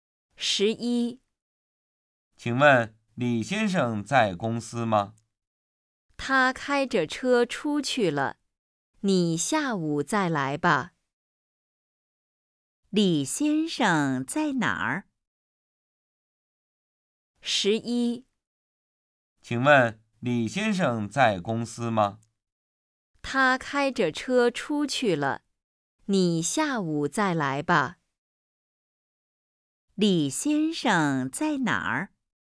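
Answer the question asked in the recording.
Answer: 开着车出去了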